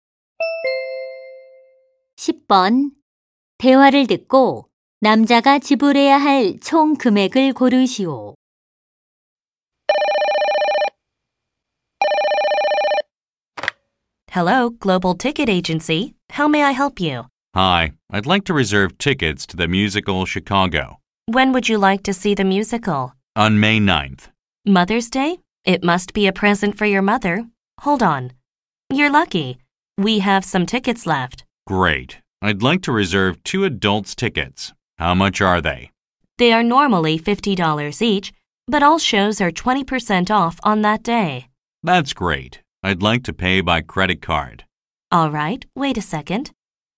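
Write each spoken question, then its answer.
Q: 대화를 듣고 남자가 지불해야 할 총 금액을 고르시오.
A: 80달러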